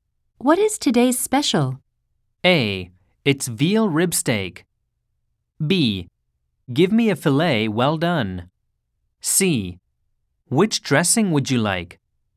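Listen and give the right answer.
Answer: A: It's veal rib steak.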